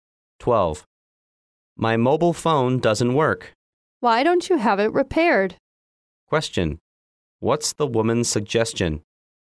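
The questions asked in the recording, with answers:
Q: What's the woman's suggestion?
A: Having the mobile phone repaired.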